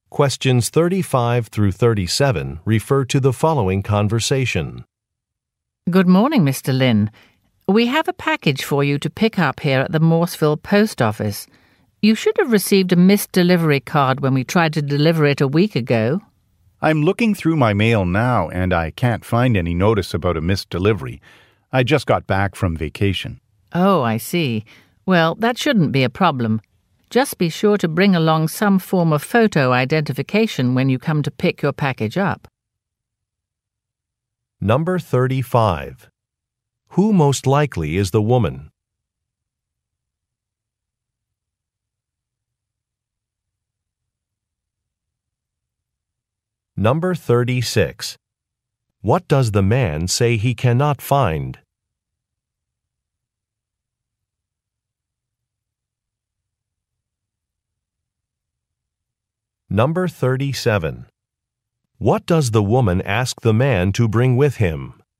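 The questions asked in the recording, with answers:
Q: Who most likely is the woman?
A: A post office employee

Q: What does the man say he cannot find?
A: A missed delivery notice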